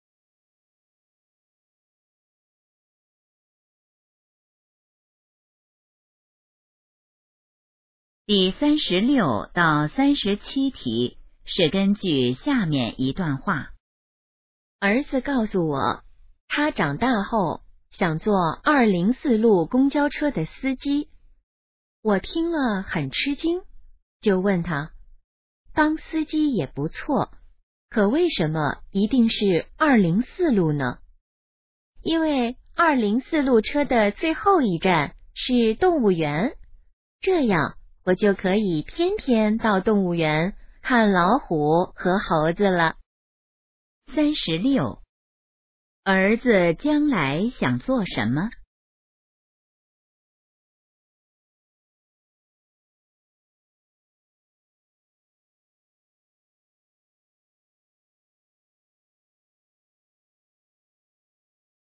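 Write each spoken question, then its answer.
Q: 儿子将来想做什么?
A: 204路公交车司机

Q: 关于204路公交车,可以知道什么?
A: 最后一站是动物园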